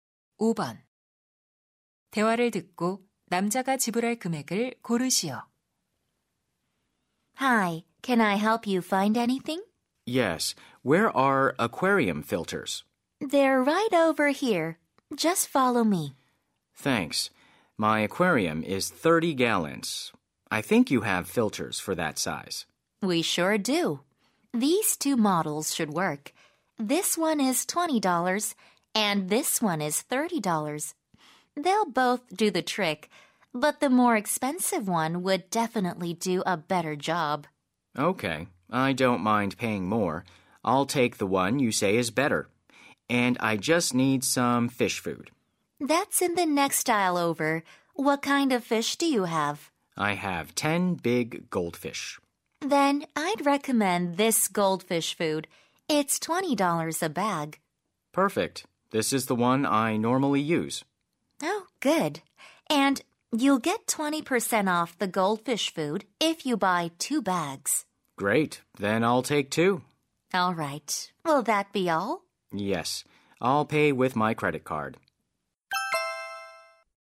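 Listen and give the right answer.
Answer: $62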